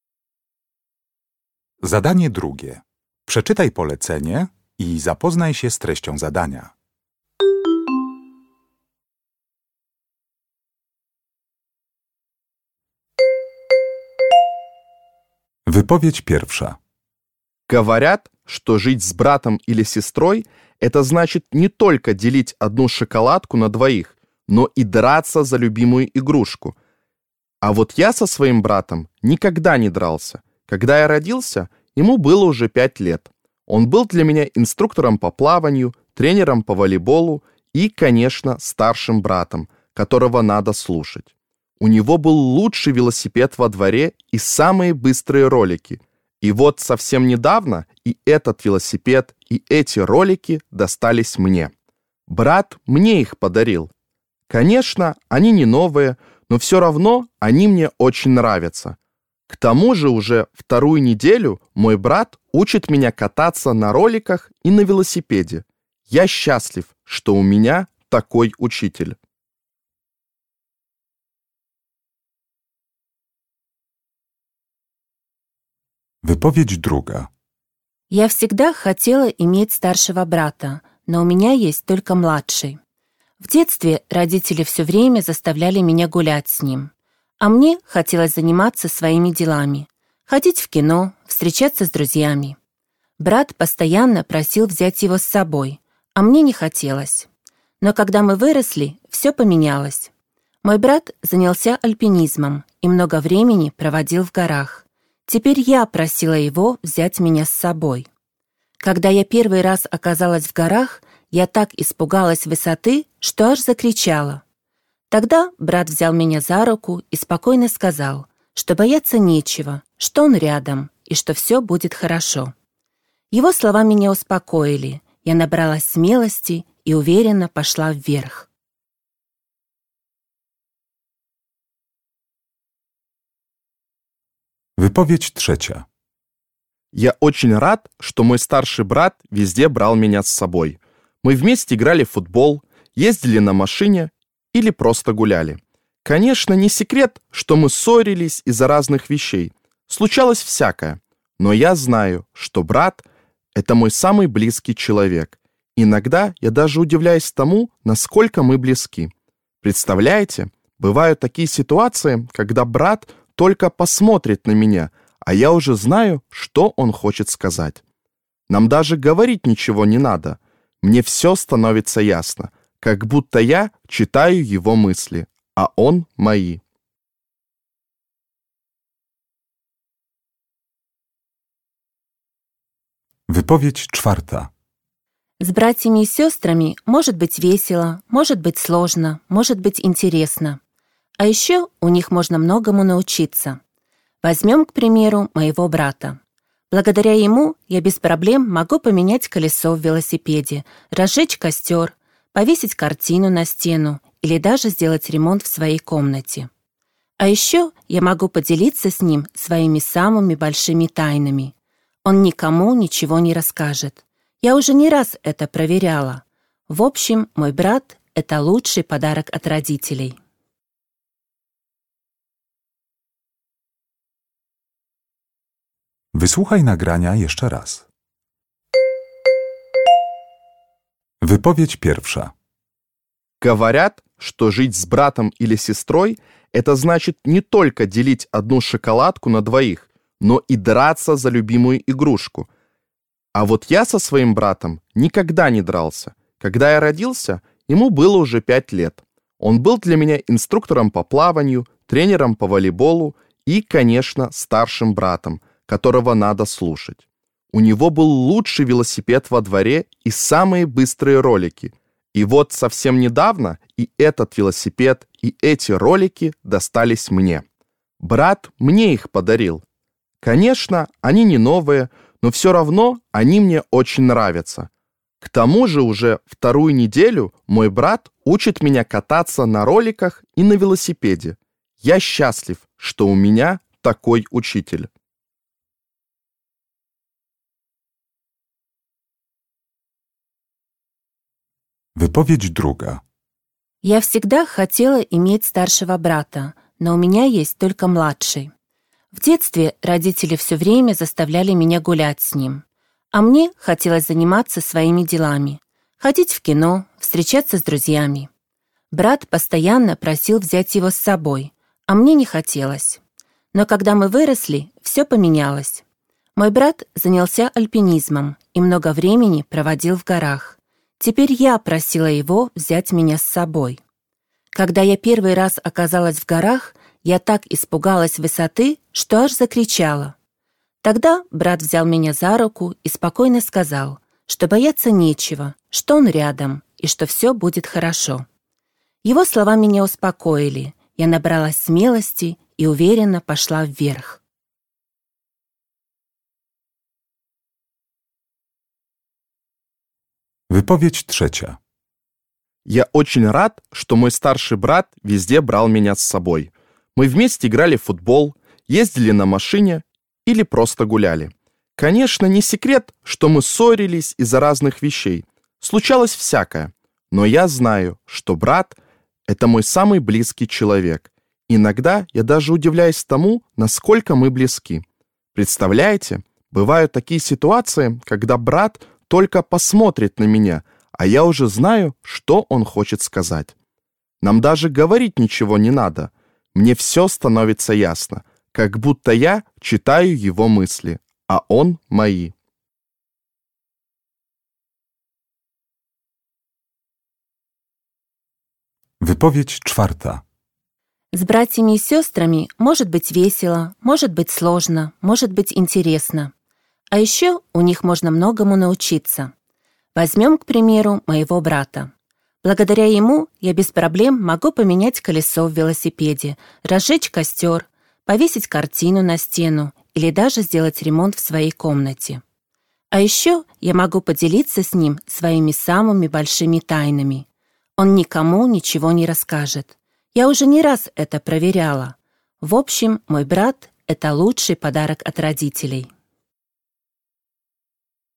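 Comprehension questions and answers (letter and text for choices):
Uruchamiając odtwarzacz z oryginalnym nagraniem CKE usłyszysz dwukrotnie cztery wypowiedzi na temat rodzeństwa. Na podstawie informacji zawartych w nagraniu dopasuj do każdej wypowiedzi (2.1.–2.4.) odpowiadające jej zdanie (A–E).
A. Моему брату можно доверить любой секрет.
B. Для моего брата трудно найти подарок.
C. Мы понимаем друг друга без слов.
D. Вещи старшего брата теперь мои.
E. Брат помог мне победить страх.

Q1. 2.1.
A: D. Вещи старшего брата теперь мои.

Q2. 2.2.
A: E. Брат помог мне победить страх.

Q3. 2.3.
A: C. Мы понимаем друг друга без слов.

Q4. 2.4.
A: A. Моему брату можно доверить любой секрет.

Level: egzamin ósmoklasisty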